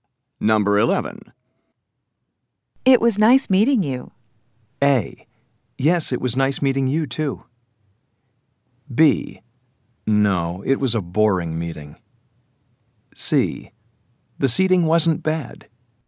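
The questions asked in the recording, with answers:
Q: It was nice meeting you.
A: A: Yes, it was nice meeting you, too.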